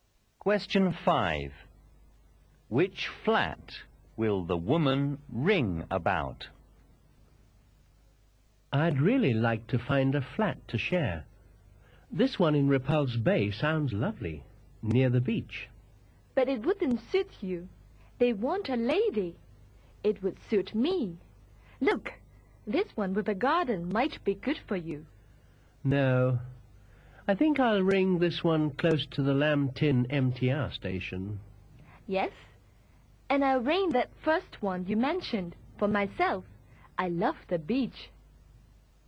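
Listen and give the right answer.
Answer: The flat in Repulse Bay near the beach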